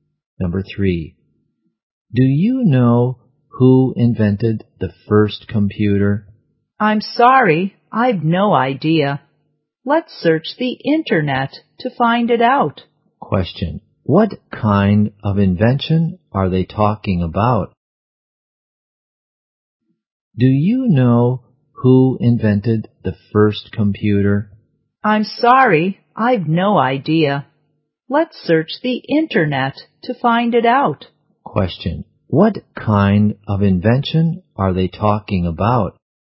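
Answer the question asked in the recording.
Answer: The computer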